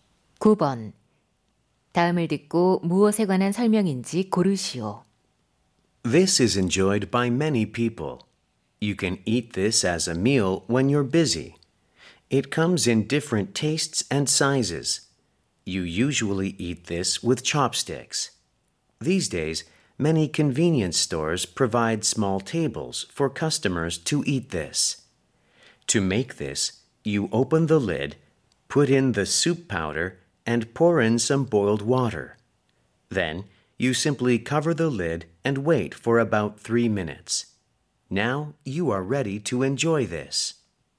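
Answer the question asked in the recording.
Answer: 컵라면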